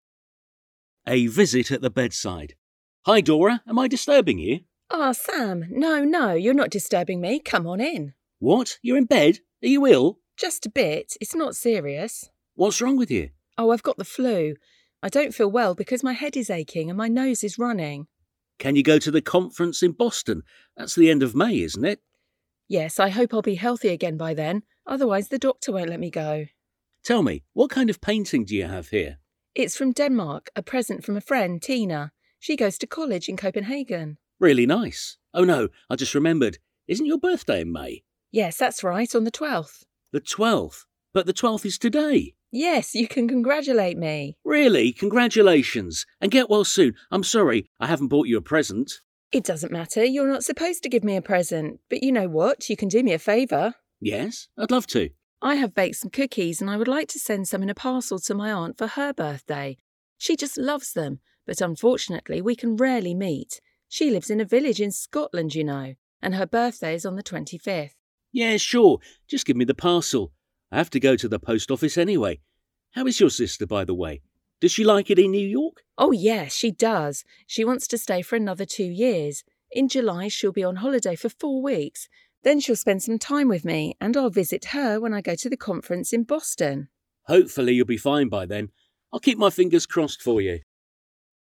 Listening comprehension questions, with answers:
Hallgasd meg a következő rövid szöveget és találd meg a hiányzó szavakat!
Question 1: Dora is in bed because she has ...... (1).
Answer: the flu

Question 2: She doesn't feel well because her ..... (2) and ...... (3).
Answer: head is aching

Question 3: She doesn't feel well because her ..... (2) and ...... (3).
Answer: her nose is running

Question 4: She's planning to go to Boston at ...... (4) to ...... (5).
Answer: the end of May

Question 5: She's planning to go to Boston at ...... (4) to ...... (5).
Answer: a conference

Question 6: If she doesn't get better by then her doctor ...... (6).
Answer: won't let her go

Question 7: She received ..... (7) from a friend who ...... (8) in Copenhagen.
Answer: a painting

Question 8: She received ..... (7) from a friend who ...... (8) in Copenhagen.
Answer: goes to college

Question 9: Her birthday is on the ...... (9).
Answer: twelfth of May

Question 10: Her aunt lives in ...... (10) and her birthday is on the ..... (11).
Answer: a village in Scotland

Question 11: Her aunt lives in ...... (10) and her birthday is on the ..... (11).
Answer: twenty-fifth

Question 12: Dora has ...... (12) for her and would like to send them in ...... (13).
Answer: baked some cookies

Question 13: Dora has ...... (12) for her and would like to send them in ...... (13).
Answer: a parcel

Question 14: Her sister lives in New York and wants to ..... (14).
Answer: stay for another two years

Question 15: She'll visit Dora in ..... (15).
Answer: July

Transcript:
A visit at the bedside
S: Hi, Dora, am I disturbing you?
D: Ah, Sam! No, no, you're not disturbing me. Come on in!
S: What? You're in bed? Are you ill?
D: Just a bit, it's not serious.
S: What's wrong with you?
D: Oh, I've got the flu. I don't feel well because my head is aching, and my nose is running.
S: Can you go to the conference in Boston? That's at the end of May, isn't it?
D: Yes, I hope I'll be healthy again by then. Otherwise, the doctor won't let me go.
S: Tell me, what kind of painting do you have here?
D: It's from Denmark. A present from a friend, Tina. She goes to college in Copenhagen.
S: Really nice! – Oh no, I just remembered: Isn't your birthday in May?
D: Yes, that's right, on the twelfth.
S: The twelfth? But the twelfth is today!
D: Yes, you can congratulate me.
S: Really! Congratulations! And get well soon! I'm sorry, I haven't brought you a present.
D: It doesn't matter. You're not supposed to give me a present! But you know what? You can do me a favour.
S: Yes? I'd love to.
D: I have baked some cookies and I would like to send some in a parcel to my aunt for her birthday. She just loves them, but unfortunately, we can rarely meet. She lives in a village in Scotland, you know. And her birthday is on the twenty-fifth.
S: Yeah, sure. Just give me the parcel! I have to go to the post office anyway. How is your sister, by the way? Does she like it in New York?
D: Oh, yes, she does. She wants to stay for another two years. In July she'll be on holiday for four weeks. Then she'll spend some time with me. And I'll visit her when I go to the conference in Boston.
S: Hopefully, you'll be fine by then. I'll keep my fingers crossed for you.

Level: B1